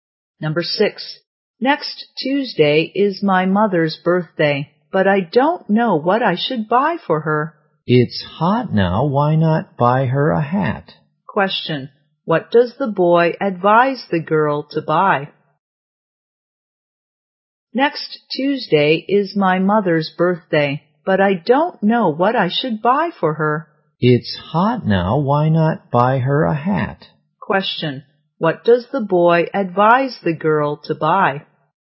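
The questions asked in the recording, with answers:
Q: what does the boy advise the girl to buy?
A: A hat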